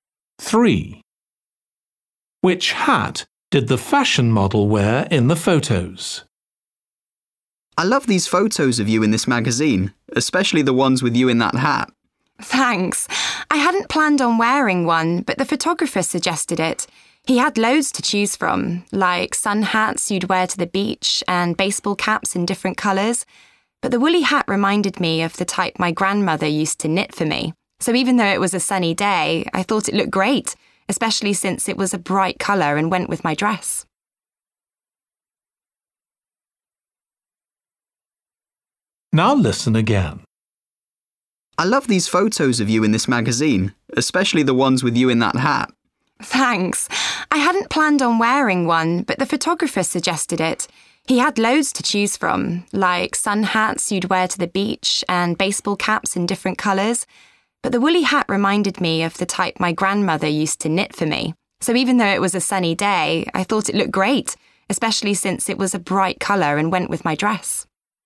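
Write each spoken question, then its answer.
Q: Which hat did the fashion model wear in the photos?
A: A brightly coloured woolly hat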